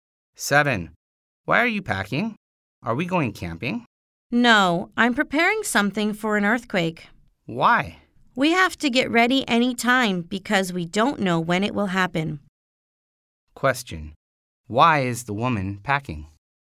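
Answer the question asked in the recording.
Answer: To prepare for an earthquake.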